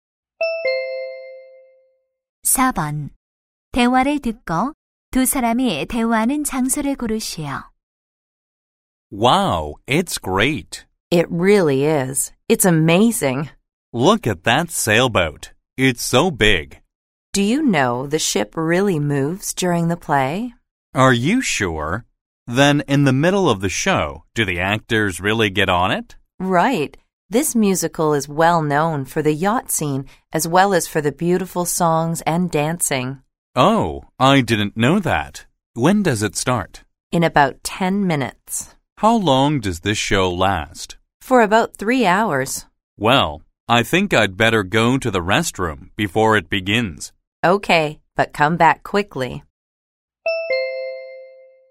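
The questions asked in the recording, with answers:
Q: 대화를 듣고 두 사람이 대화하는 장소를 고르시오.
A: 뮤지컬 공연장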